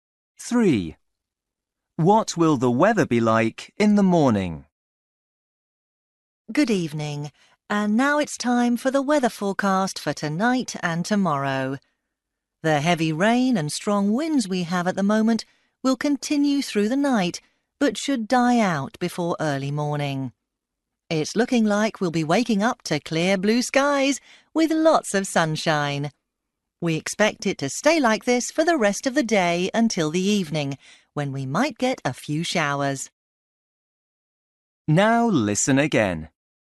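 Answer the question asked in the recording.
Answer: Sunny with clear blue skies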